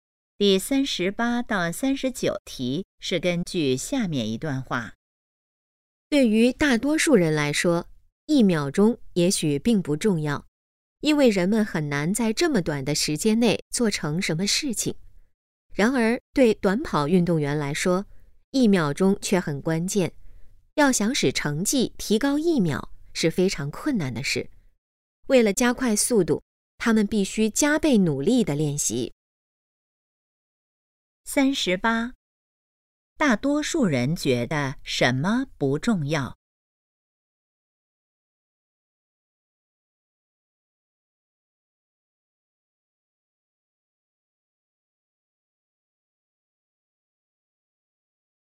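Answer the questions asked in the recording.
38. 一秒钟
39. 一秒钟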